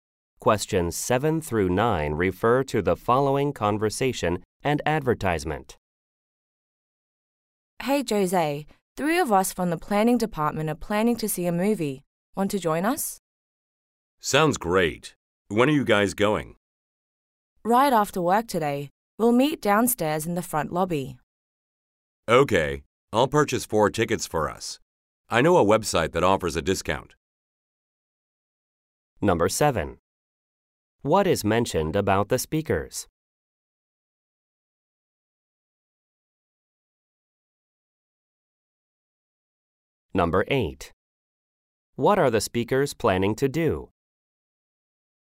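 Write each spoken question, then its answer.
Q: What are the speakers planning to do?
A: See a movie after work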